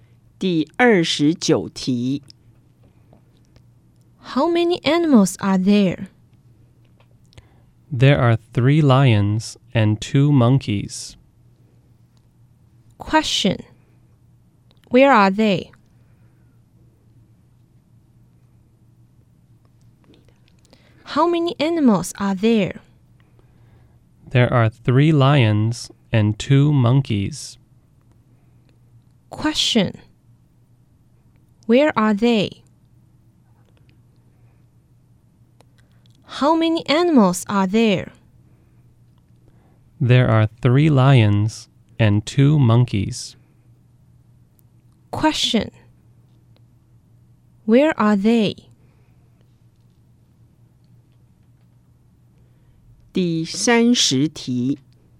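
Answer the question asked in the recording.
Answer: Five (3 lions and 2 monkeys)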